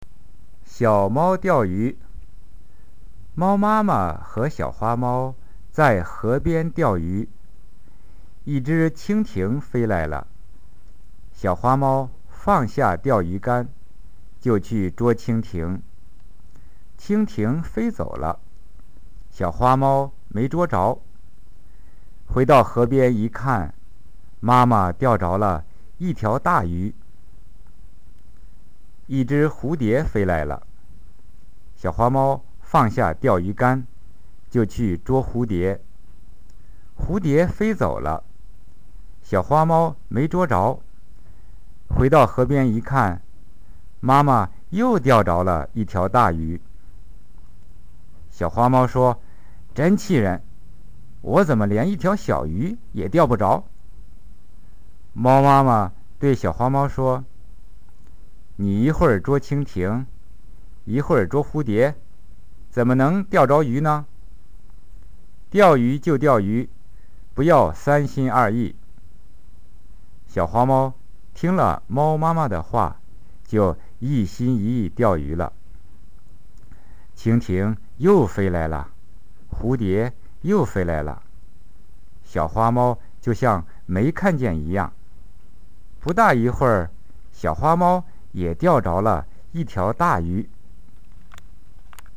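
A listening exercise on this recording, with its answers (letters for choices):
☆ 中国語の文章を聞いて、質問の答えをクリックしてください。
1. 小猫はどこで釣りをしていましたか。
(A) 海岸。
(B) 湖畔。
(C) 川辺。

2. 一番初めに小猫の方に飛んで来たものは?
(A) 小鳥。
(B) とんぼ。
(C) ちょうちょ。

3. 母猫は魚を何匹釣り上げましたか。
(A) 0匹。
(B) 1匹。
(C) 2匹。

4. ちょうちょが初めて飛んできた時,小猫はどうしましたか?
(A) 目に入らないかのように無視した。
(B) 釣り竿を置いて捕まえに行った。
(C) 釣り竿を使って捕らえようとした。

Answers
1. C
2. B
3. C
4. B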